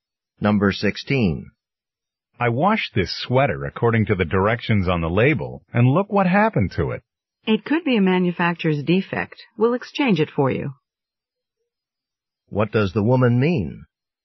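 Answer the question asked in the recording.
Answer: The store will exchange the sweater.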